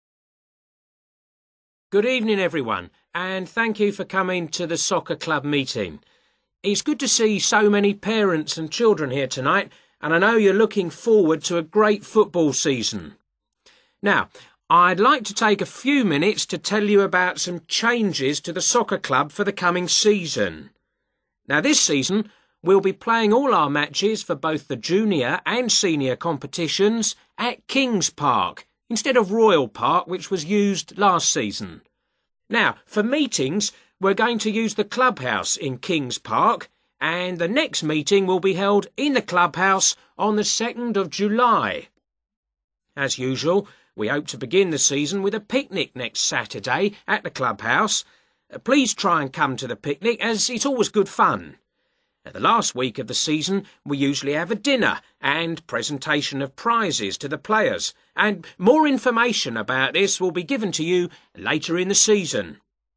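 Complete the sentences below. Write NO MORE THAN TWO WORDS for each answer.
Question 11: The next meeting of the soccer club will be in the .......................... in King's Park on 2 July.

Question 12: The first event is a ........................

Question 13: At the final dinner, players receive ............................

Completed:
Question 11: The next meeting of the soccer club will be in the clubhouse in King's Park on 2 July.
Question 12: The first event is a picnic
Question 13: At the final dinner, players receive prizes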